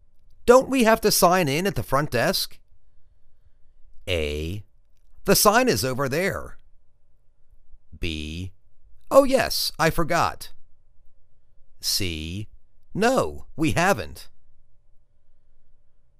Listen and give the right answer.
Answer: Oh yes, I forgot.